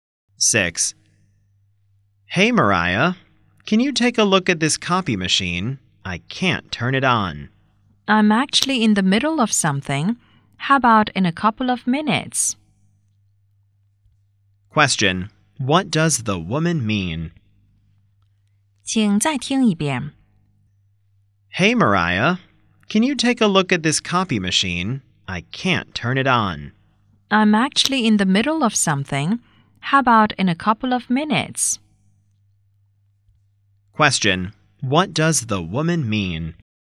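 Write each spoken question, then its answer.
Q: Question. What does the woman mean?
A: She is busy now but can help in a couple of minutes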